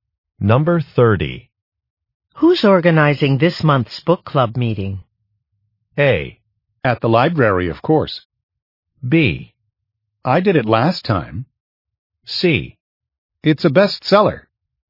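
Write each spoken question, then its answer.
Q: Who's organizing this month's book club meeting?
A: B: I did it last time.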